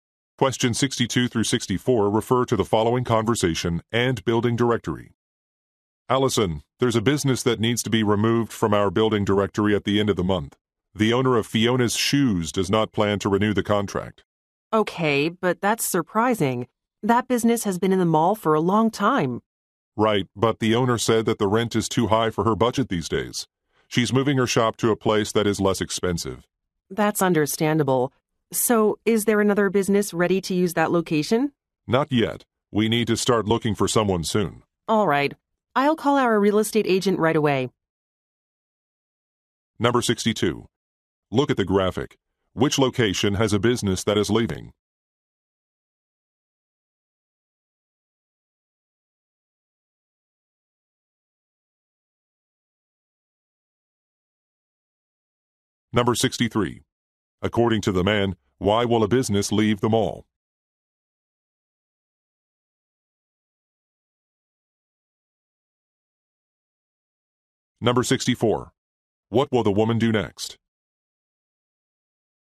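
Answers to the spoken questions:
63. The rent is too high
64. Call a real estate agent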